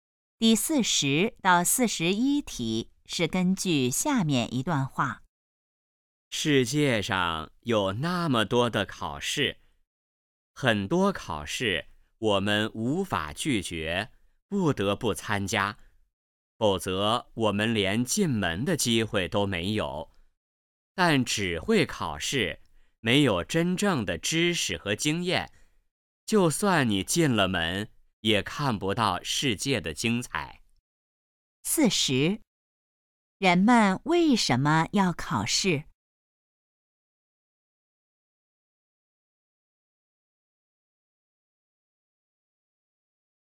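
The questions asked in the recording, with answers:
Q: 人们为什么要考试?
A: 为了得到进门的机会

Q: 要看到世界的精彩,需要什么?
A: 真正的知识和经验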